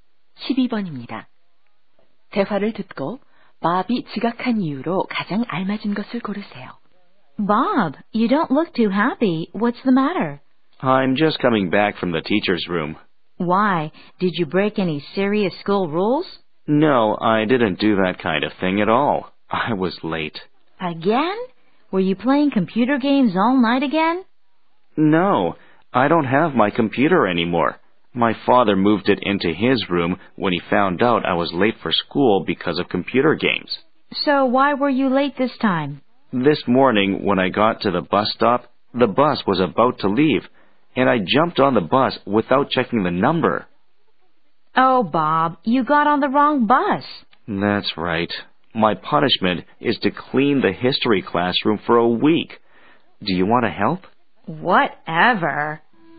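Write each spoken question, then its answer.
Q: 대화를 듣고 Bob이 지각한 이유로 가장 알맞은 것을 고르세요.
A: 버스를 잘못 타서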